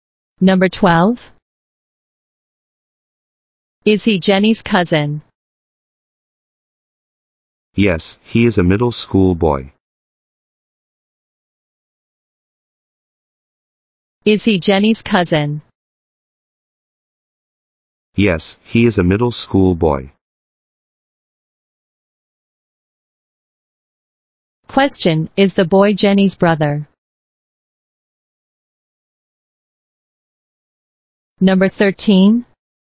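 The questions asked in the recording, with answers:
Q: is the boy Jenny's brother?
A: No, he is Jenny's cousin.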